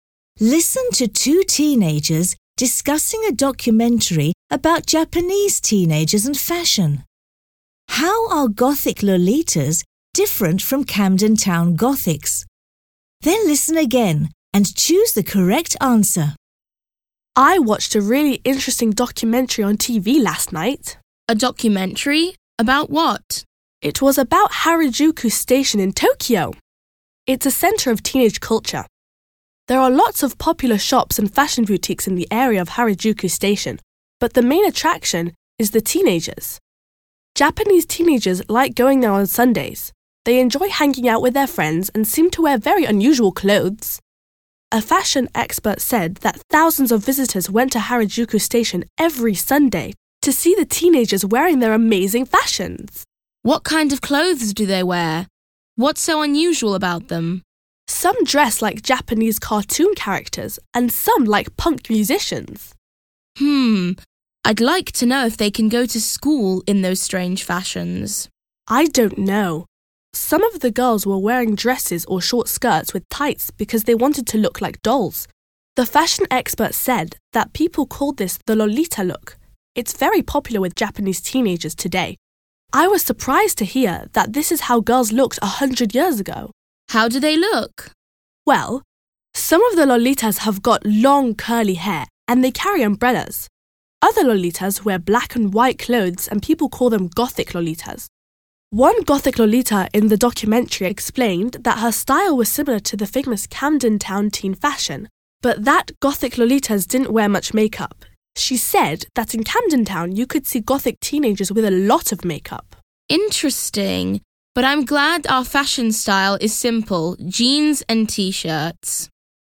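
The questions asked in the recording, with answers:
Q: How are Gothic Lolitas different from Camden Town Gothics?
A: Gothic Lolitas don't wear much makeup.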